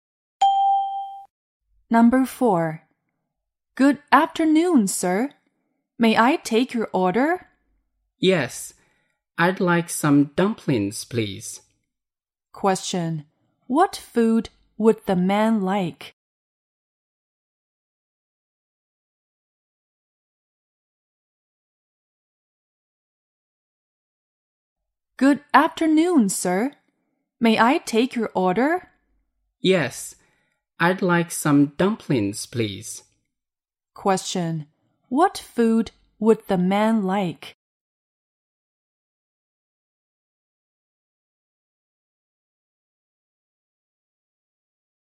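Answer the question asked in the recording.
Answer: Dumplings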